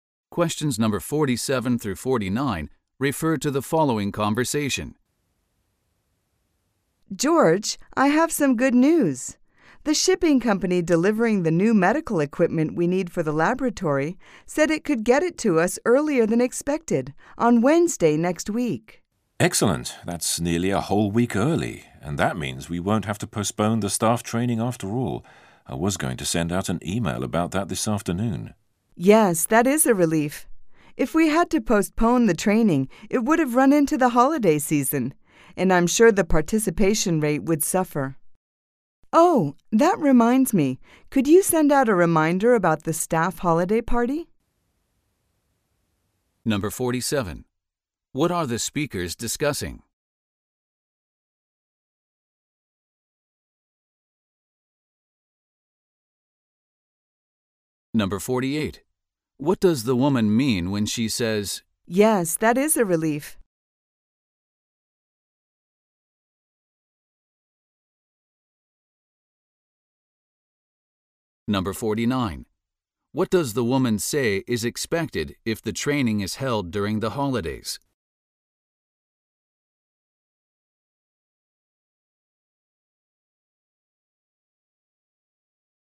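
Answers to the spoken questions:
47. An early delivery of new medical equipment for the laboratory
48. She is glad the staff training won't have to be postponed
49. Participation would be low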